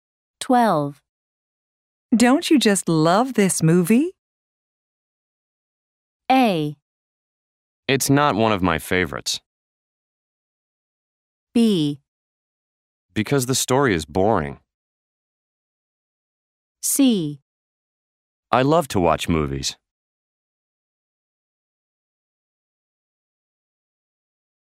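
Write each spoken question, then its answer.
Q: Don't you just love this movie?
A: A: It's not one of my favorites.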